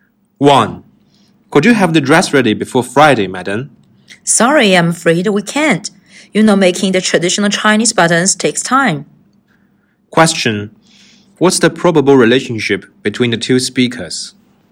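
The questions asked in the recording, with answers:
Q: What's the probable relationship between the two speakers?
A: Customer and tailor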